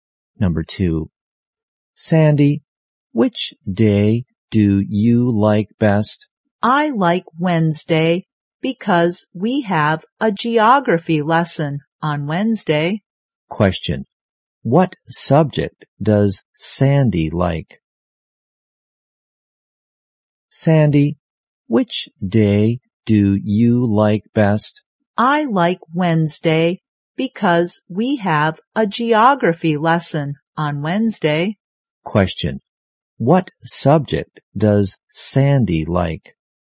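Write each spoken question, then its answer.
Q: Question, what subject does Sandy like?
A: Geography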